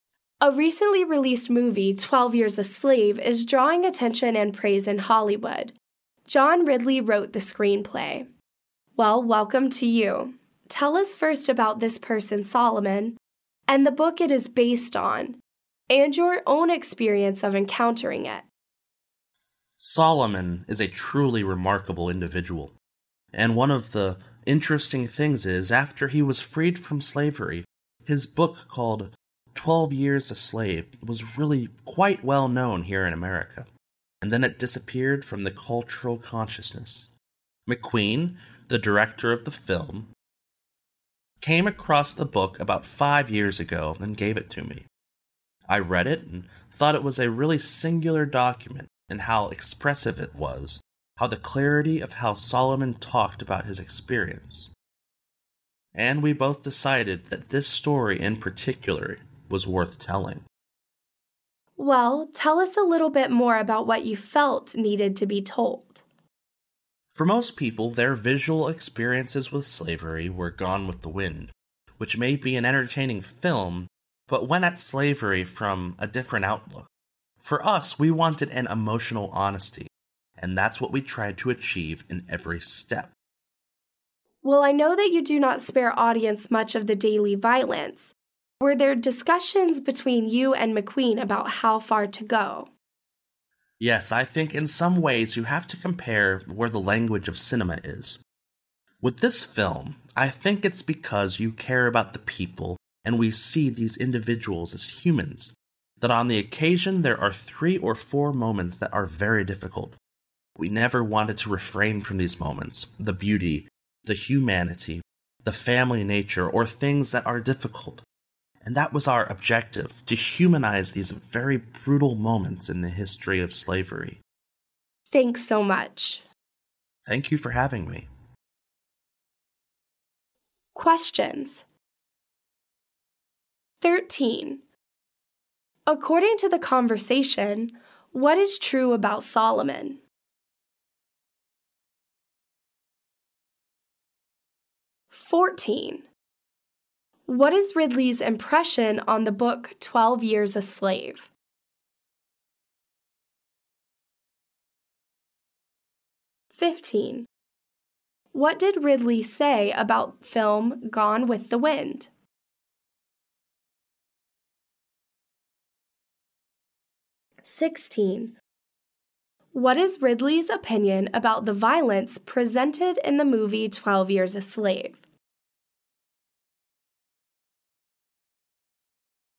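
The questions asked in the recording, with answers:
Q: What is Ridley's impression on the book 12 Years a Slave?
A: A singular, expressive document that told Solomon's experience clearly

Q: What did Ridley say about film Gone with the Wind?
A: It may be entertaining, but it showed slavery from a different outlook

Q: What is Ridley's opinion about the violence presented in the movie 12 Years a Slave?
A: The violent moments were necessary and were meant to humanize brutal moments of slavery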